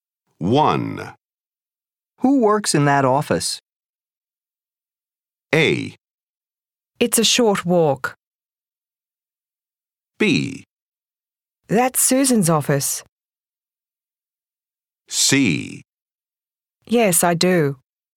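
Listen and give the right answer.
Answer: B: That's Susan's office.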